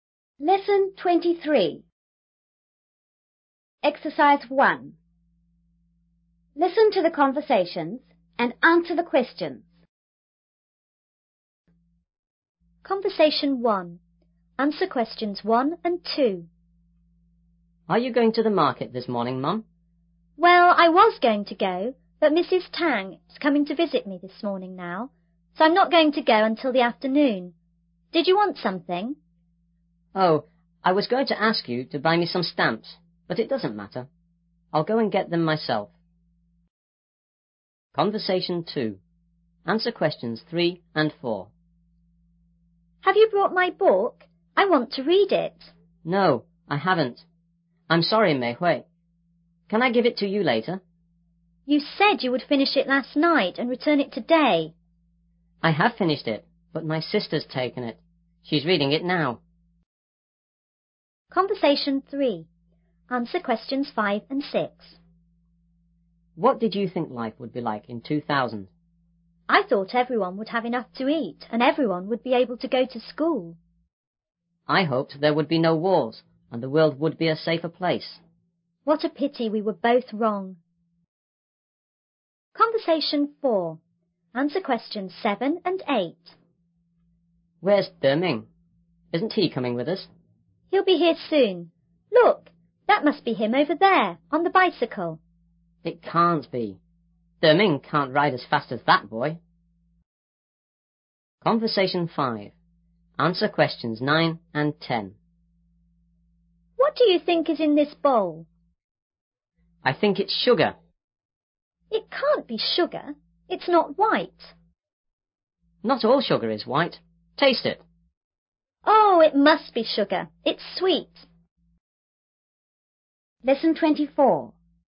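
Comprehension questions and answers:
1.Listen to the conversations and answer the question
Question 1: Will the boy's mother go to the market?_________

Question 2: Who will buy the stamps?__________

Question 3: Where is the book?_________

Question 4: Who has read the book?_________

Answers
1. Yes, in the afternoon.
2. The boy.
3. His sister has it.
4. The boy (and his sister is reading it).

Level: 5B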